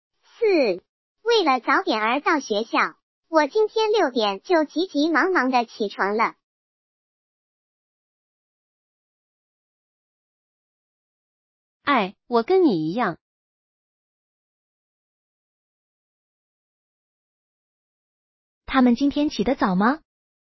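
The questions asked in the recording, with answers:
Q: 他们今天起得早吗?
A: 早,六点就起床了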